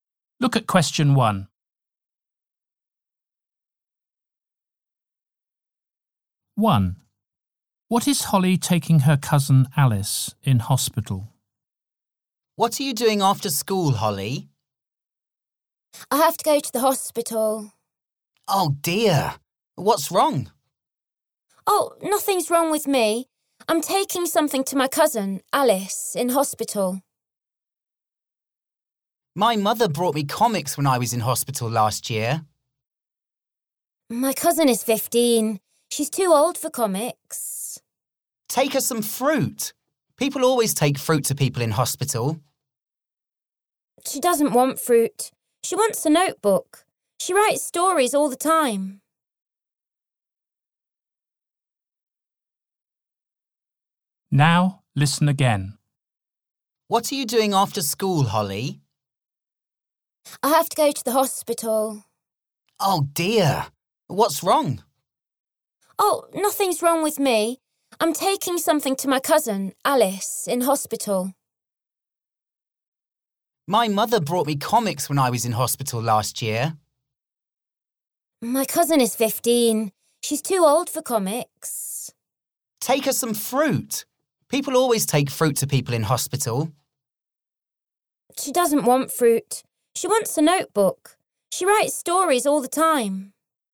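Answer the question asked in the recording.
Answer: A notebook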